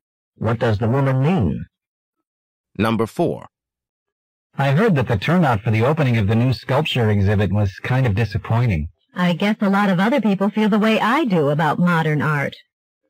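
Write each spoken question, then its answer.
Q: What does the woman mean?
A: She doesn't like modern art either.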